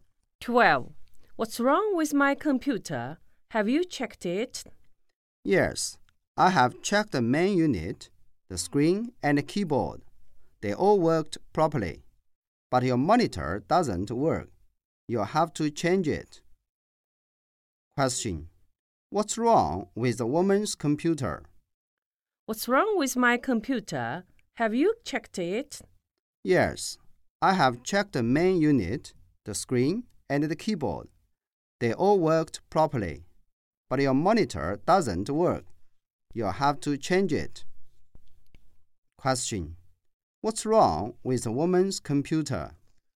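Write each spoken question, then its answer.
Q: What's wrong with the woman's computer?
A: The monitor doesn't work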